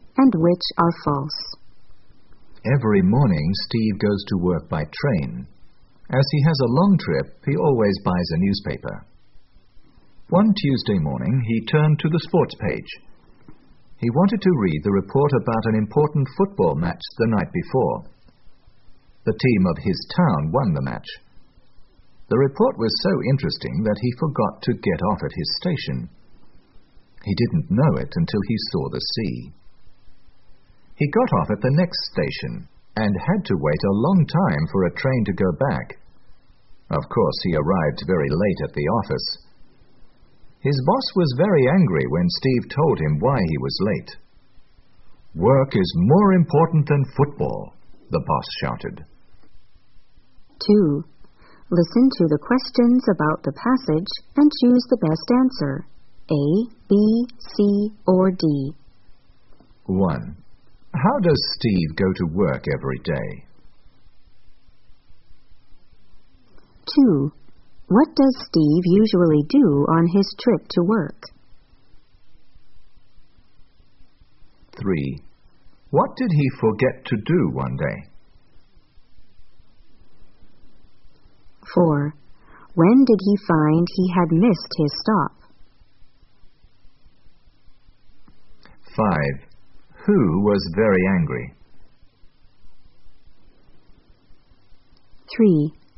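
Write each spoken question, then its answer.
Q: How does Steve go to work every day?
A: By train

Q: What does Steve usually do on his trip to work?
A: He reads a newspaper

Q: What did he forget to do one day?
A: To get off at his station

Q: When did he find he had missed his stop?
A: When he saw the sea

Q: Who was very angry?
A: His boss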